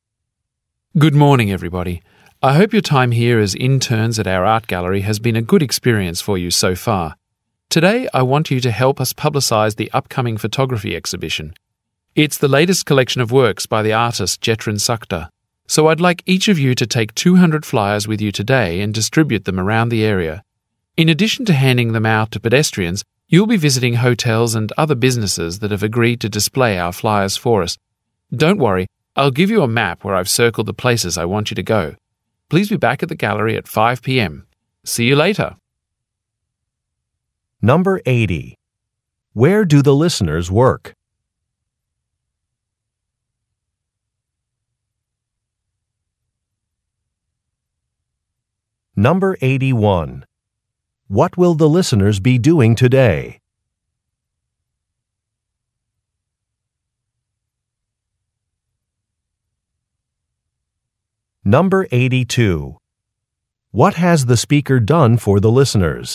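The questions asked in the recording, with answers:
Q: Where do the listeners work?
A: At an art gallery (as interns)

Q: What will the listeners be doing today?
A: Distributing flyers for a photography exhibition

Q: What has the speaker done for the listeners?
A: Marked places to visit on a map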